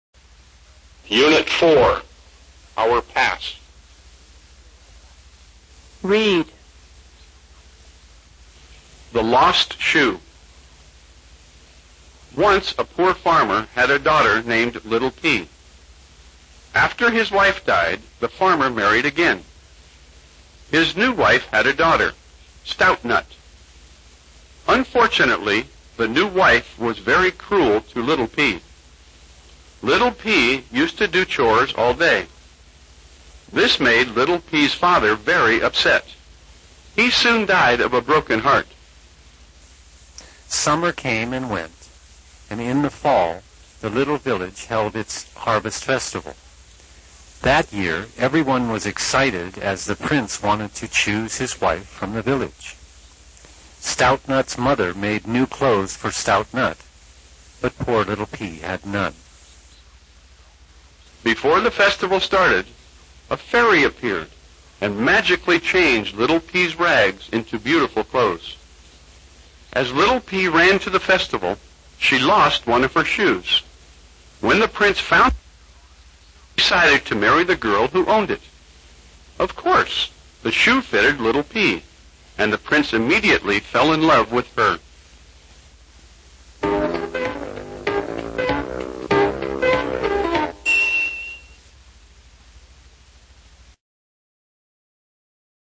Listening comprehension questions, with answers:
2. Answer the questions. Write the answers in your exercise book.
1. Who was Little Pea?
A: Little Pea was a poor farmet's daughter.

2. What did Stout Nut's mother make Little Pea do all day?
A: Stout Nut's mother made Little Pea do the chores all day.

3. How did Little Pea get her new clothes?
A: A fairy magically changed her rags into beautiful clothes.

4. Who did the prince decide to marry?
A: The prince decided to marry the girl who owed the shoe.

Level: SGK Tiếng Anh 8